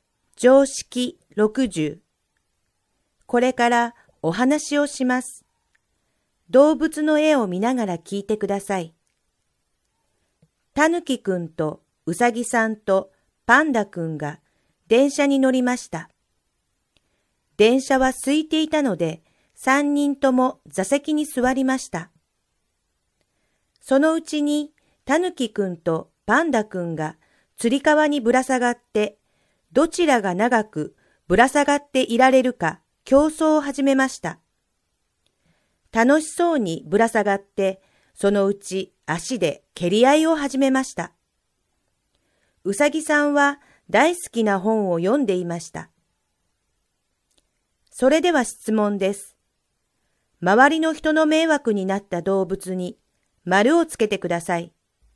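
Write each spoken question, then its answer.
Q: 周りの人の迷惑になった動物に丸をつけてください。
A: たぬきくんとパンダくん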